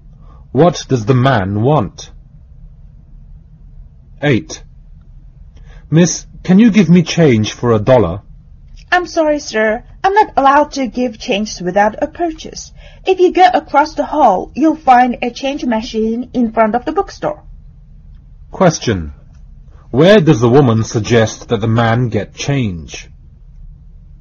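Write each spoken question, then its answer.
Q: Where does the woman suggest that the man get change?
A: At the change machine in front of the bookstore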